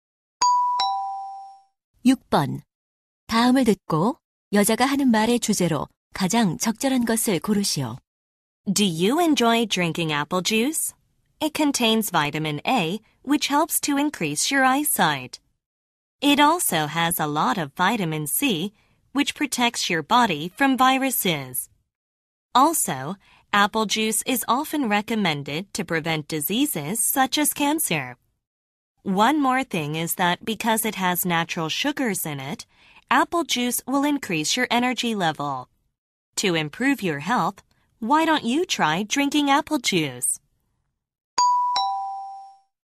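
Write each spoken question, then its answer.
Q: 다음을 듣고 여자가 하는 말의 주제로 가장 적절한 것을 고르시오.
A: 사과 주스가 건강에 좋은 점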